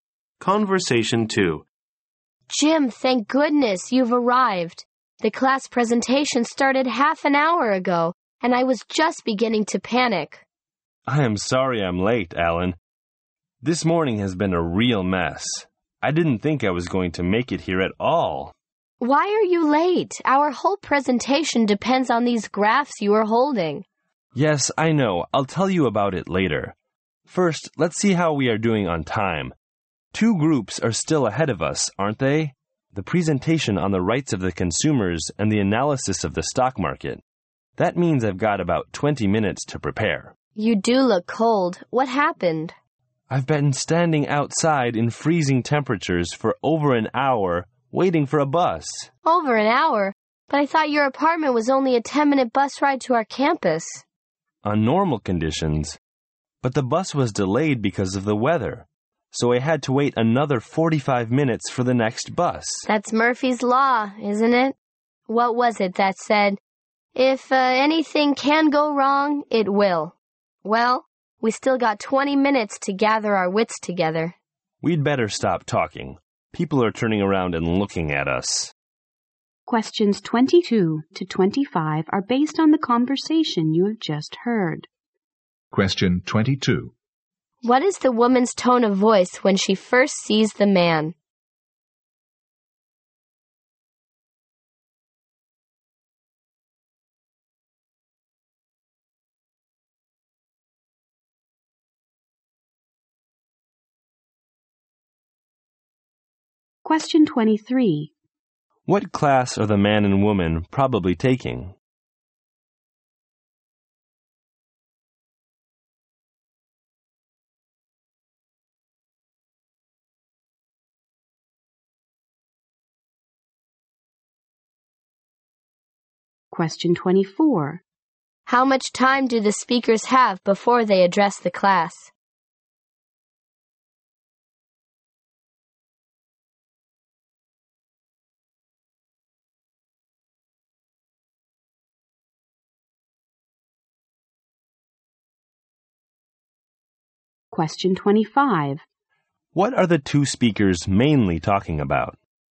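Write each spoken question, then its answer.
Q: What is the woman's tone of voice when she first sees the man?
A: Relieved

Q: How much time do the speakers have before they address the class?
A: About 20 minutes

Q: What are the two speakers mainly talking about?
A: Why the man was late for their class presentation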